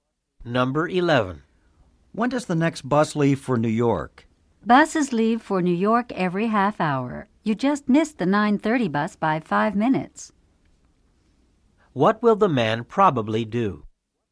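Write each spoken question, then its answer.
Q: What will the man probably do?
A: Take the 10:00 bus.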